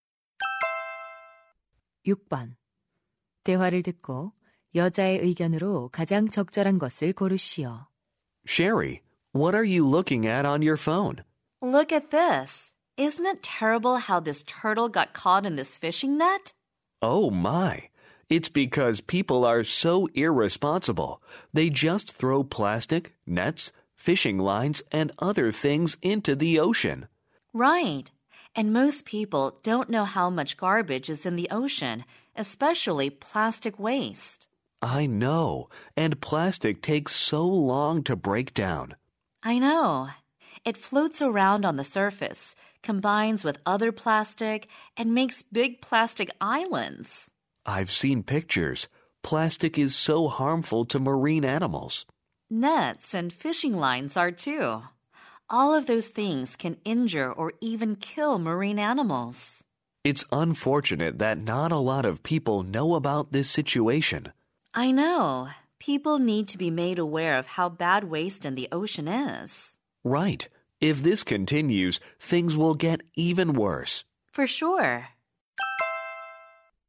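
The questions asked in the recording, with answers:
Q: 대화를 듣고 여자의 의견으로 가장 적절한 것을 고르시오.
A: 사람들이 해양 쓰레기의 심각성을 알아야 한다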